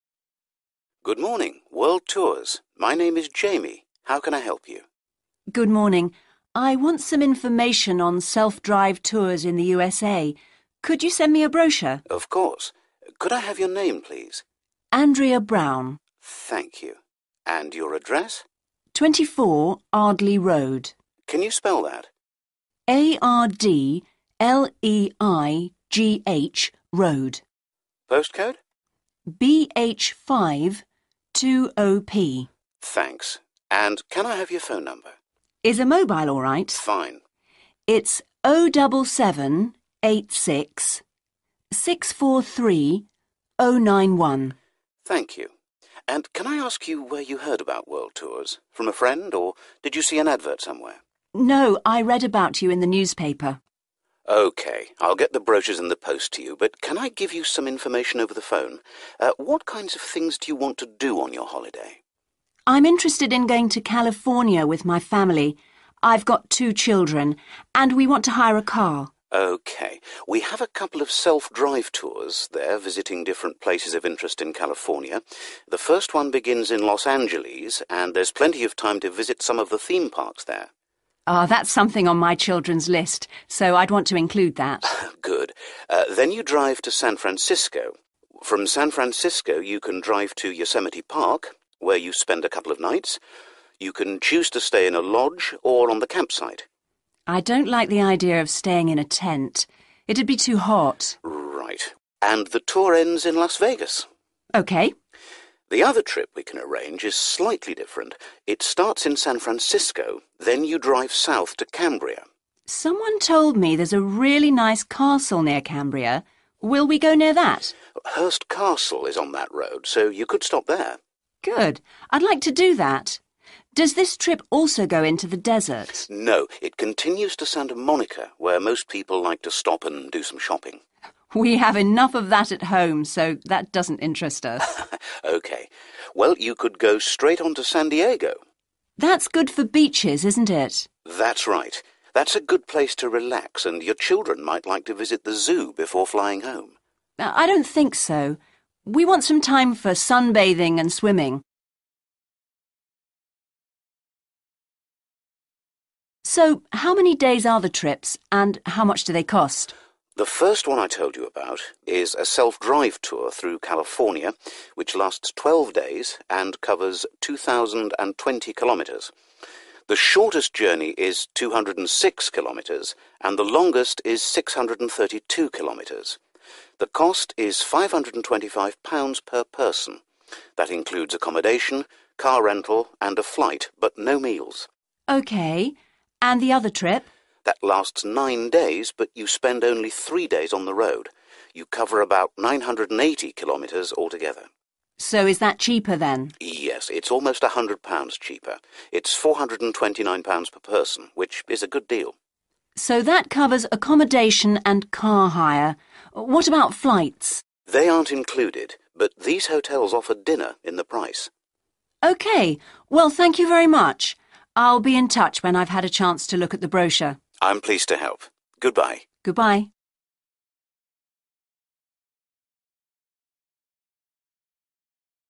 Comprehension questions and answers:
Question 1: Could you send me a (1) __________?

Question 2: From a (2) __________? Or did you see an advert somewhere?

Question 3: No, I read about you in the (3) __________.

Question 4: we want to hire a (4) __________.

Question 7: I don't like the idea of staying in a (7) __________. It'd be too hot.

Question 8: Someone told me there's a really nice (8) __________ near Cambria.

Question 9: Does this trip also go into the (9) __________?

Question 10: where most people like to stop and do some (10) __________.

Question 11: That's good for (11) __________, isn't it?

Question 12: your children might like to visit the (12) __________ before flying home.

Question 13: We want some time for (13) __________ and (14) __________.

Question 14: We want some time for (13) __________ and (14) __________.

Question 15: That includes accommodation, car rental, and a (15) __________ but no meals.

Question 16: So is that (16) __________ then?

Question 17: So that covers accommodation and (17) __________.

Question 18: But these hotels offer (18) __________ in the price.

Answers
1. brochure
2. friend
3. newspaper
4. car
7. tent
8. castle
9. desert
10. shopping
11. beaches
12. zoo
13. sunbathing
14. swimming
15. flight
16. cheaper
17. car hire
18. dinner

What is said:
Good morning. World Tours. My name is Jamie. How can I help you?
Good morning. I want some information on self-drive tours in the USA.
Could you send me a brochure?
Of course. Could I have your name please?
Andrea Brown.
Thank you. And your address?
24. Ardleigh Road.
Can you spell that?
A-R-D-L-E-l-G-H Road.
Postcode?
Thanks. And can I have your phone number?
Is a mobile alright?
Fine.
Thank you. And can I ask you where you heard about World Tours? From a friend? Or did you see an advert somewhere?
No. I read about you in the newspaper. California self-drive tours
OK, I'll get the brochures in the post to you but can I give you some information over the phone. What kinds of things do you want to do on your holiday?
I'm interested in going to California with my family. I've got two children and we want to hire a car.
OK. We have a couple of self-drive tours there visiting different places of interest in California. The first one begins in Los Angeles and there's plenty of time to visit some of the theme parks there.
That's something on my children's list so I'd want to include that.
Good. Then you drive to San Francisco. From San Francisco you can drive to Yosemite Park where you spend a couple of nights. You can choose to stay in a lodge or on the campsite.
I don't like the idea of staying in a tent. It'd be too hot.
Right. And the tour ends in Las Vegas.
OK.
The other trip we can arrange is slightly different. It starts in San Francisco. Then you drive south to Cambria.
Someone told me there's a really nice castle near Cambria. Will we go near that?
Hearst Castle is on that road so you could stop there.
Good. I'd like to do that. Does this trip also go into the desert?
No, it continues to Santa Monica where most people like to stop and do some shopping.
We have enough of that at home so that doesn't interest us.
Well you could go straight on to San Diego.Nearby car dealershipsDesert excursions
That's good for beaches isn't it?
That's right, that's a good place to relax and your children might like to visit the zoo before flying home.
I don't think so. We want some time for sunbathing and swimming.
So how many days are the trips and how much do they cost?
The first one I told you about is a self-drive tour through California which lasts twelve days and covers 2.020 kilometres. The shortest journey is 206 km and the longest is 632 kilometres. The cost is £525 per person.
That includes accommodation, car rental and a flight but no meals.
That lasts nine days but you spend only three days on the road. You cover about 980 kilometres altogether.
So is that cheaper then?
Yes, it's almost a hundred pounds cheaper. It's £429 per person, which is a good deal.
So that covers accommodation and car hire. What about flights?
They aren't included. But these hotels offer dinner in the price.
Well, thank you very much. I'll be in touch when I've had a chance to look at the brochure.
I'm pleased to help. Goodbye.
Goodbye.